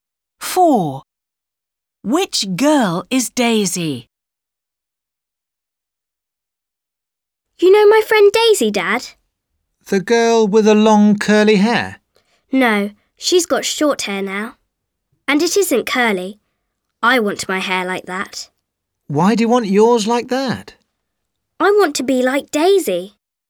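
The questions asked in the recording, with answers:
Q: Which girl is Daisy?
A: The girl with short hair that isn't curly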